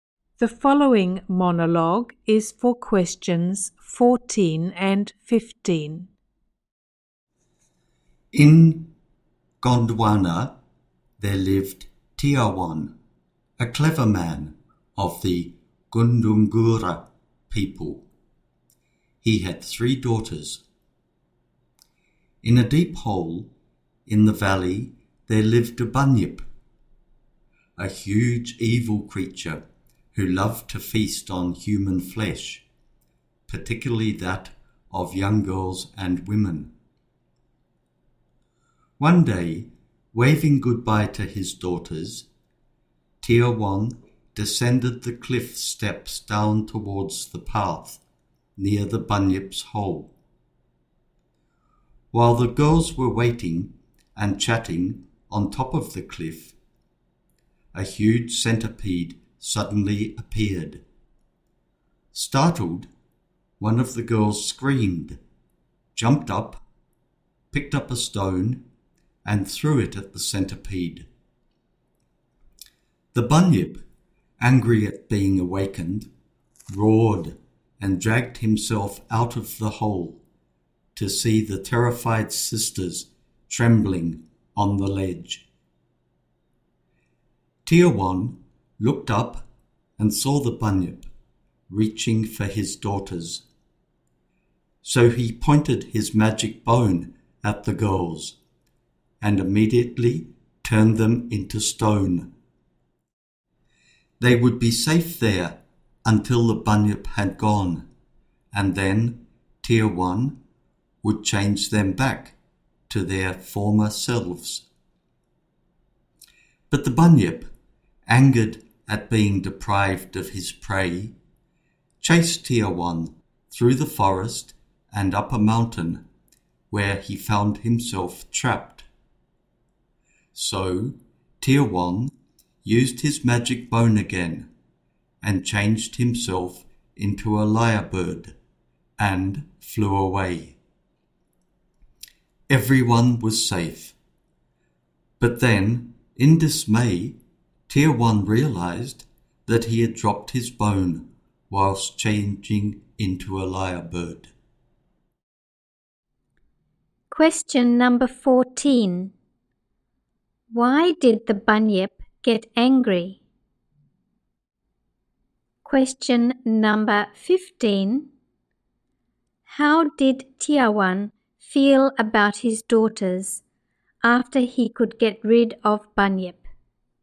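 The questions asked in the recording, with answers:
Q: Why did the bunyip get angry?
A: Because he was woken up by the girl's scream and the stone she threw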